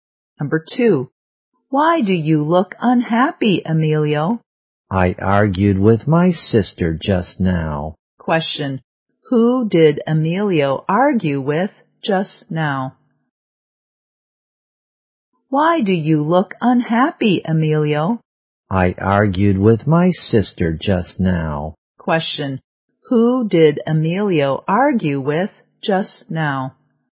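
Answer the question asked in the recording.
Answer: His sister.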